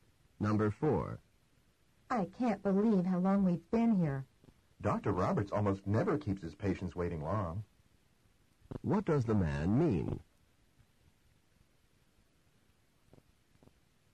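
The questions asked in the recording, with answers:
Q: What does the man mean?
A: Dr. Roberts usually doesn't make patients wait long, so this is unusual.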